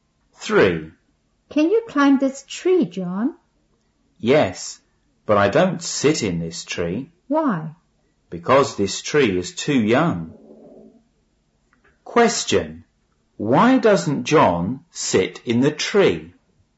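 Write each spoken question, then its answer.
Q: Question. Why doesn't John sit in the tree?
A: Because the tree is too young.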